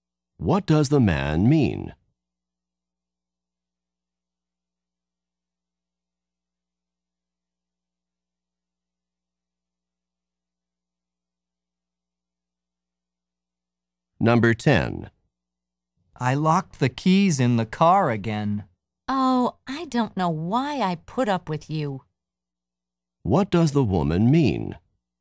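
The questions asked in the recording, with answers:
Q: What does the woman mean?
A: She doesn't know why she tolerates him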